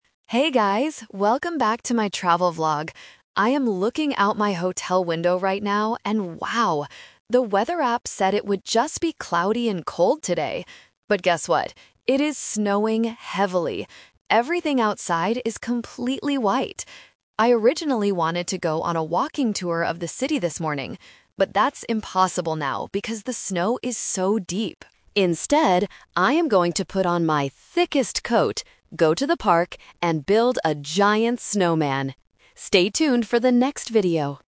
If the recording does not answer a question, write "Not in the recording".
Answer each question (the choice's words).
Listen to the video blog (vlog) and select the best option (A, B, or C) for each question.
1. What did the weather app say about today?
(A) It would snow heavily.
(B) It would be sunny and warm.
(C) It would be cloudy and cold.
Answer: It would be cloudy and cold.

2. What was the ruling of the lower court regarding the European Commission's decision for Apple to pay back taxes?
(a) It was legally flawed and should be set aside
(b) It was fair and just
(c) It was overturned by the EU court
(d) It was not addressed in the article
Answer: Not in the recording

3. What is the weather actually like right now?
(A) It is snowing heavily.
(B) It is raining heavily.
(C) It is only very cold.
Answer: It is snowing heavily.

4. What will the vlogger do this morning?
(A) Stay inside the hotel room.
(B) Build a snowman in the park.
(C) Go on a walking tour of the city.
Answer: Build a snowman in the park.

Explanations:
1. The vlogger says, "The weather app said it would just be cloudy and cold today." Option (A) is the trap because heavy snow is the actual weather, not what the app predicted. Option (B) is never mentioned.
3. The vlogger looks out the window and says, "But guess what? It is snowing heavily!" Option (C) is a trap because the app predicted it would be cold, but the actual surprise is the snow. Option (B) is not mentioned.
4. The vlogger changes the plan (The Twist): "Instead, I am going to put on my thickest coat, go to the park, and build a giant snowman!" Option (C) is the trap because it was the initial plan ("I originally wanted to go on a walking tour..."), but it is now impossible. Option (A) is a plausible action but the vlogger decides to go outside.

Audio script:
Vlogger: Hey guys! Welcome back to my travel vlog. I am looking out my hotel window right now, and wow! The weather app said it would just be cloudy and cold today. But guess what? Everything outside is completely white. I originally wanted to go on a walking tour of the city this morning. But that's impossible now because the snow is so deep. Instead, I am going to put on my thickest coat, go to the park, and build a giant snowman! Stay tuned for the next video!